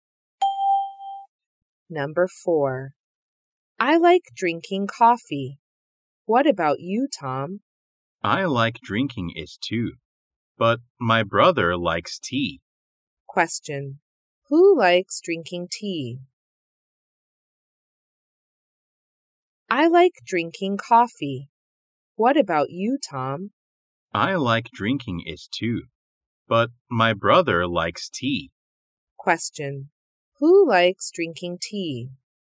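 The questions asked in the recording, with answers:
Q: Who likes drinking tea?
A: Tom's brother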